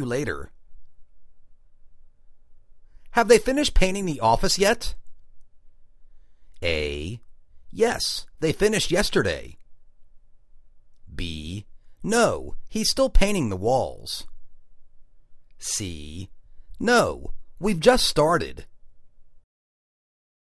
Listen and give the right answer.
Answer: Yes, they finished yesterday.